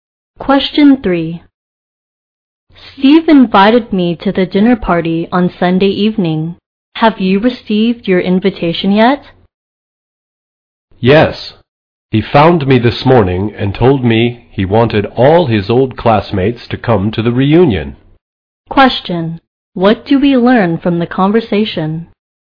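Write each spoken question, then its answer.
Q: What do we learn from the conversation?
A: Steve is inviting his old classmates to a reunion dinner party.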